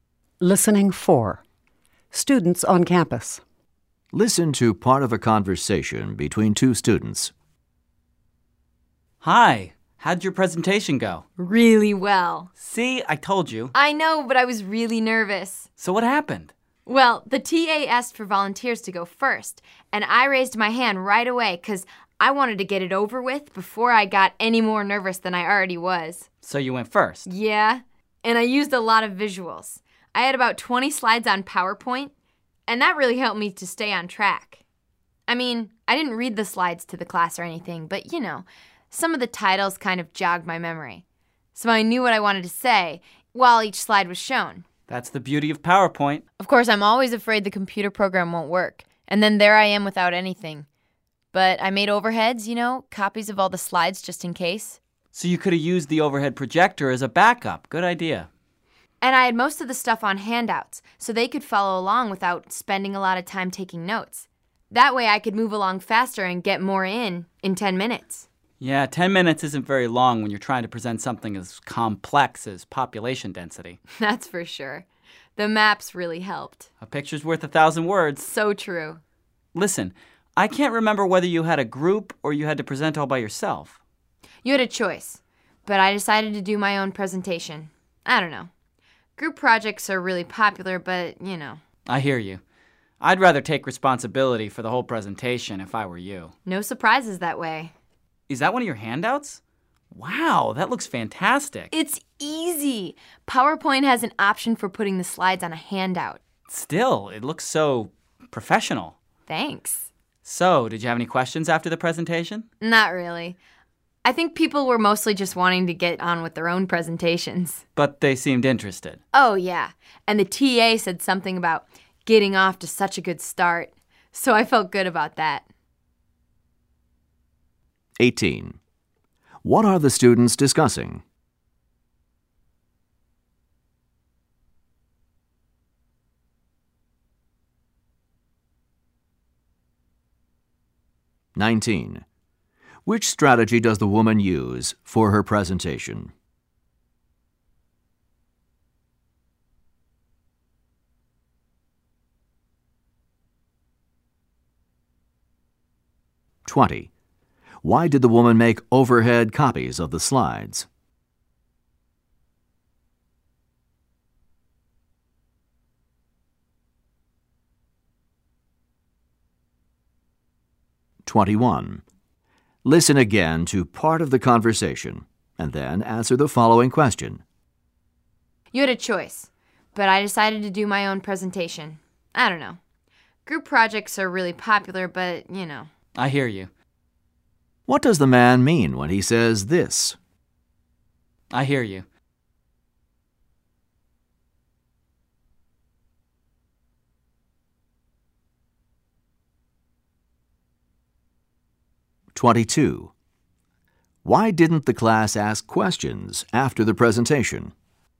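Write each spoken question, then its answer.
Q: What are the students discussing?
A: The woman's presentation

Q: Which strategy does the woman use for her presentation?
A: Visuals: PowerPoint slides, maps and handouts

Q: Why did the woman make overhead copies of the slides?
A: As a backup in case the computer program didn't work

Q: Why didn't the class ask questions after the presentation?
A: They mostly wanted to get on with their own presentations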